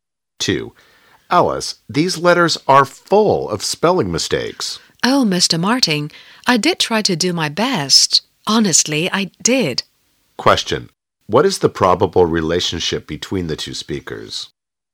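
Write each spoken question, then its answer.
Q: Question. What is the probable relationship between the two speakers?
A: Boss and secretary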